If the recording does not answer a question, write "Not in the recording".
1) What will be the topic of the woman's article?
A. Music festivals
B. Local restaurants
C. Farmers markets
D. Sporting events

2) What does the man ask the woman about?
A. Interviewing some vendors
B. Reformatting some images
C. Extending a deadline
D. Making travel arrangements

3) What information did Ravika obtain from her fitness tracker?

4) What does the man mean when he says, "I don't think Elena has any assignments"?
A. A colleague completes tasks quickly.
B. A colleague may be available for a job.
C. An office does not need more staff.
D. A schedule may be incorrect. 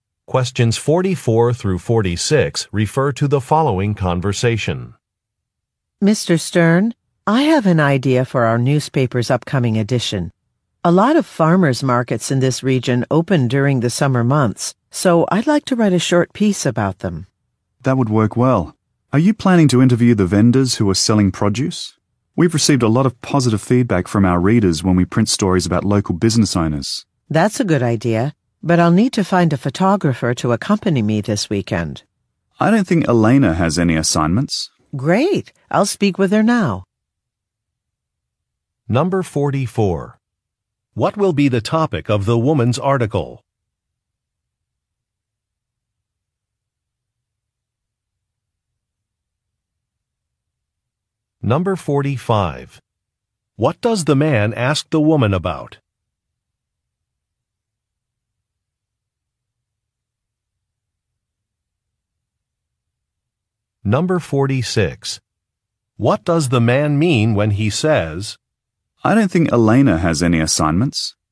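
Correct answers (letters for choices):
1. C
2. A
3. Not in the recording
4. B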